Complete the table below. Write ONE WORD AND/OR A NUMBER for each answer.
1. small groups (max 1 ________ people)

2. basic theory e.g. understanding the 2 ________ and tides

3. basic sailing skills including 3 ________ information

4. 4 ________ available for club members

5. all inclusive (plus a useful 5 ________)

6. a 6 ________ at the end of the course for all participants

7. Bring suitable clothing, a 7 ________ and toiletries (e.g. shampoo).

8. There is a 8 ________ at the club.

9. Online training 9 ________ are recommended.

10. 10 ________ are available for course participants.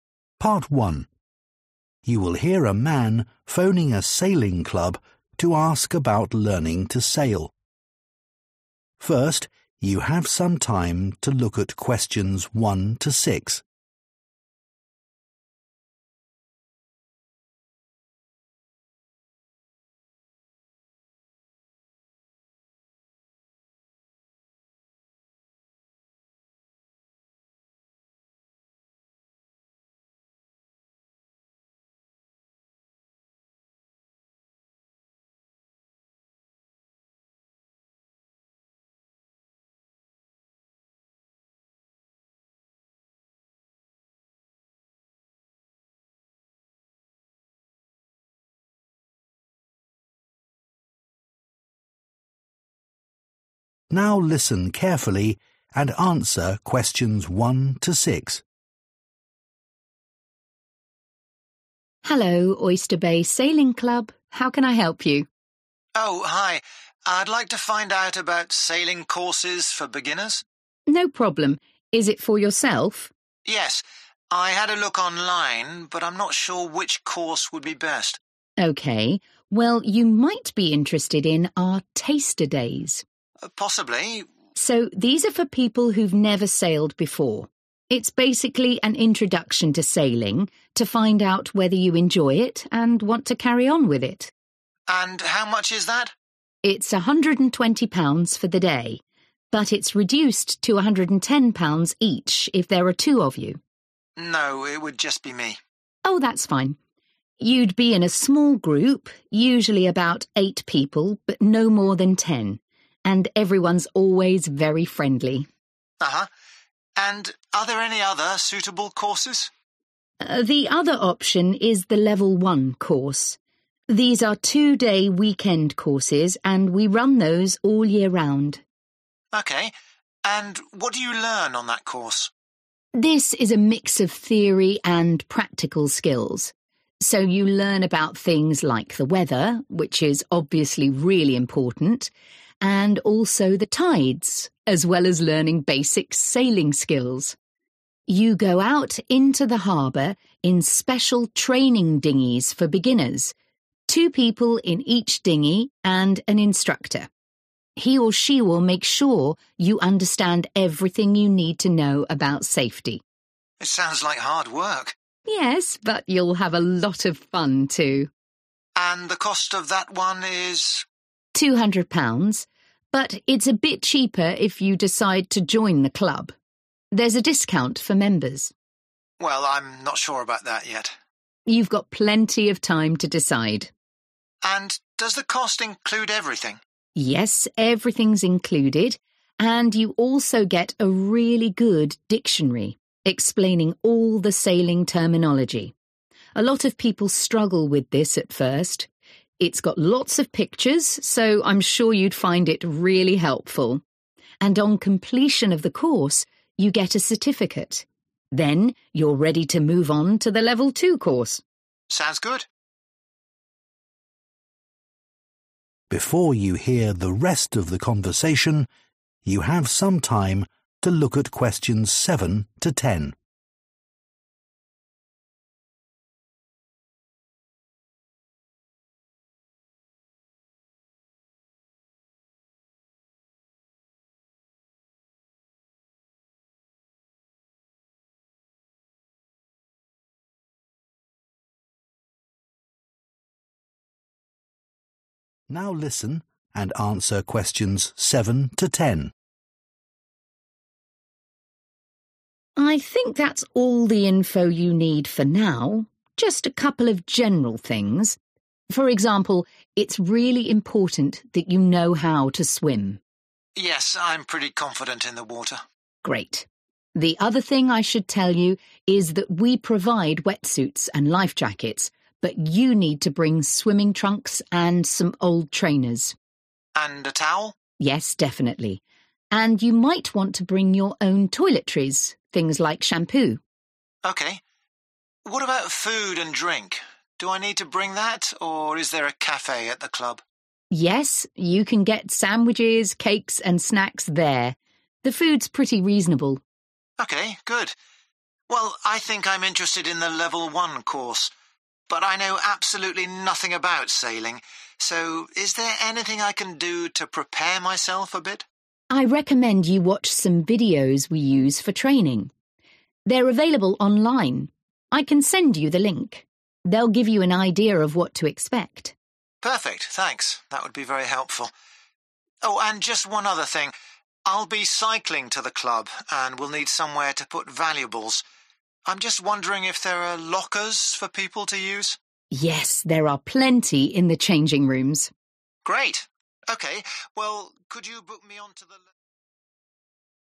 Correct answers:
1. ten
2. weather
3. safety
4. discount
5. dictionary
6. certificate
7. towel
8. cafe
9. videos
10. lockers

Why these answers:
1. Từ cần điền là số vì từ max giúp chúng ta xác định được tối đa bao nhiêu người Nội dung bài: trong bài nghe đề cập "no more than", tức là không quá bao nhiêu người (đồng nghĩa với số người tối đa). Vì vậy, ta loại bỏ số gây nhiễu là eight (chỗ này đề cập chung chung "usually about")
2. Từ cần điền là danh từ (đếm được số nhiều hoặc không đếm được) – dựa vào danh từ tides sau liên từ 'and' và đi sau động từ 'understanding' Nội dung bài: understanding được diễn đạt thành learn about things like. Cấu trúc song song nối bằng "and".
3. Từ cần điền là tính từ hoặc danh từ đóng vai trò bổ nghĩa cho "information" Nội dung bài: Cụm "everything you need to know about" tương đương với information.
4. Từ cần điền là danh từ, cụ thể hơn là đề cập đến dịch vụ hay ưu đãi nào đó cho người có thẻ thành viên Nội dung bài: Vào câu lạc bộ thì mọi người được hưởng giá rẻ hơn (it's a bit cheaper if you decide to join the club)
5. Từ cần điền là danh từ đếm được số ít vì trước khoảng trống cần điền có mạo từ "a" và tính từ "useful" bổ nghĩa cho ô trống Nội dung bài: bài nghe dùng "everything's included" thay cho "all inclusive" và dùng "really good" thay vì "useful"
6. Từ cần điền là danh từ đếm được số ít vì trước ô trống có mạo từ "a" Nội dung bài: 'at the end of the course' được diễn đạt bằng 'on completion of the course'.
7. Từ cần điền là danh từ đếm được số ít do trước ô trống có mạo từ "a" Nội dung bài: Bài nghe đảo trật tự thông tin cần điền lên trước. Mạo từ "a" trong câu hỏi của người đàn ông trùng khớp hoàn toàn với đề bài. Người đàn ông hỏi "And a towel? (Có khăn chứ?')' và người phụ nữ trả lời 'Yes definitely' (Có)
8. Từ cần điền là danh từ đếm được số ít Nội dung bài: Người nói dùng cấu trúc hỏi có nội dung trùng khớp trong đề bài: 'is there a café at the club?' Và nhận được câu trả lời "Yes" nhằm xác nhận thông tin
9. Từ cần điền là danh từ đếm được số nhiều, dựa vào động từ are để xác định Nội dung bài: Người nói dùng dạng chủ động recommend thay vì dạng bị động như đề bài. Các từ online và training lần lượt được nhắc đến riêng lẻ thay vì được nói ngắn gọn như đề bài.
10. Từ cần điền là danh từ số nhiều làm chủ ngữ (dựa vào động từ "are" sau khoảng trống) Nội dung bài: course participants được nhắc đến trong bài nghe qua từ "people". Câu hỏi Yes/No xuất hiện để đề cập thông tin. Available lại được diễn đạt thành "there are plenty" nhằm chỉ "lockers" luôn có sẵn cho mọi người dùng, không lo bị thiếu

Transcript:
WOMAN: Hello, Oyster Bay Sailing Club. How can I help you?
MAN: Oh, hi. I'd like to find out about sailing courses for beginners.
WOMAN: No problem. Is it for yourself?
MAN: Yes. I had a look online but I'm not sure which course would be best.
WOMAN: OK. Well, you might be interested in our Taster Days.
MAN: Possibly.
WOMAN: So these are for people who've never sailed before. It's basically an introduction to sailing, to find out whether you enjoy it and want to carry on with it.
MAN: And how much is that?
WOMAN: It's £120 for the day but it's reduced to £110 each if there are two of you.
MAN: No, it would just be me.
WOMAN: Oh, that's fine. You'd be in a small group, usually about eight people but no more than ten, and everyone's always very friendly.
MAN: Uh-huh. And are there any other suitable courses?
WOMAN: The other option is the Level 1 course. These are two-day weekend courses and we run those all year round.
MAN: OK. And what do you learn on that course?
WOMAN: This is a mix of theory and practical skills. So you learn about things like the weather, which is obviously really important, and also the tides, as well as learning basic sailing skills. You go out into the harbour in special training dinghies for beginners, two people in each dinghy and an instructor. He or she will make sure you understand everything you need to know about safety.
MAN: It sounds like hard work.
WOMAN: Yes, but you'll have a lot of fun too.
MAN: And the cost of that one is?
WOMAN: £200, but it's a bit cheaper if you decide to join the club. There's a discount for members.
MAN: Well, I'm not sure about that yet.
WOMAN: You've got plenty of time to decide.
MAN: And does the cost include everything?
WOMAN: Yes, everything's included and you also get a really good dictionary explaining all the sailing terminology. A lot of people struggle with this at first. It's got lots of pictures, so I'm sure you'd find it really helpful. And on completion of the course, you get a certificate. Then you're ready to move on to the Level 2 course.
MAN: Sounds good.
WOMAN: I think that's all the info you need for now, just a couple of general things. For example, it's really important that you know how to swim.
MAN: Yes, I'm pretty confident in the water.
WOMAN: Great. The other thing I should tell you is that we provide wetsuits and life jackets, but you need to bring swimming trunks and some old trainers.
MAN: And a towel?
WOMAN: Yes, definitely. And you might want to bring your own toiletries, things like shampoo.
MAN: OK. What about food and drink? Do I need to bring that, or is there a cafe at the club?
WOMAN: Yes, you can get sandwiches, cakes and snacks there. The food's pretty reasonable.
MAN: OK, good. Well, I think I'm interested in the Level 1 course, but I know absolutely nothing about sailing, so is there anything I can do to prepare myself a bit?
WOMAN: I recommend you watch some videos we use for training. They're available online. I can send you the link. They'll give you an idea of what to expect.
MAN: Perfect, thanks. That would be very helpful. Oh, and just one other thing. I'll be cycling to the club and will need somewhere to put valuables. I'm just wondering if there are lockers for people to use?
WOMAN: Yes, there are plenty in the changing rooms.
MAN: Great. OK, well, could...